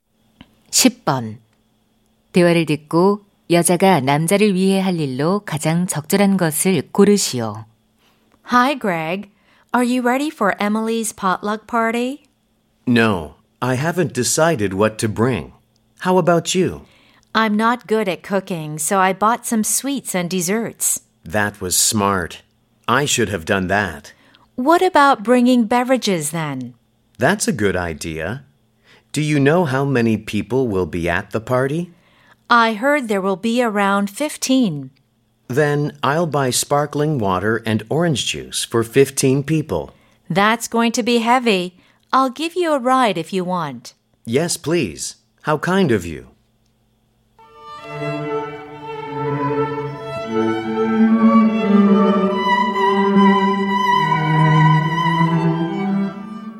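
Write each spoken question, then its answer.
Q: 대화를 듣고 여자가 남자를 위해 할 일로 가장 적절한 것을 고르시오.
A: 차로 태워다 주기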